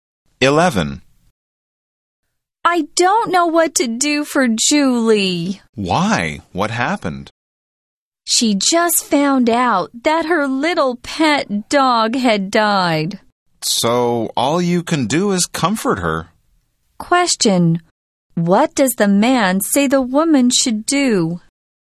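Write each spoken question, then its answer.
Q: What does the man say the woman should do?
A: Comfort Julie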